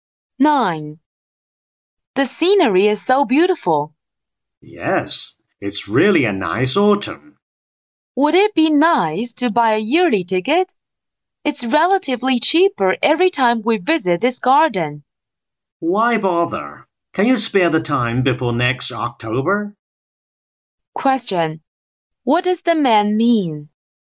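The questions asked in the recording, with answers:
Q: What does the man mean?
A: A yearly ticket is not worth buying because they won't visit often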